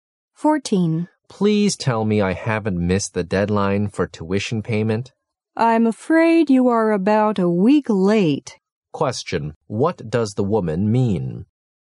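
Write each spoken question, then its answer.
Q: what does the woman mean?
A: He has missed the deadline by about a week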